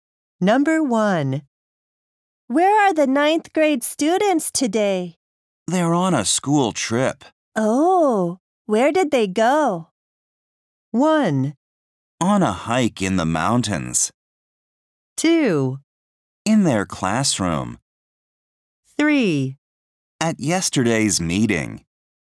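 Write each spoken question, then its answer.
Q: Oh, where did they go?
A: 1: On a hike in the mountains.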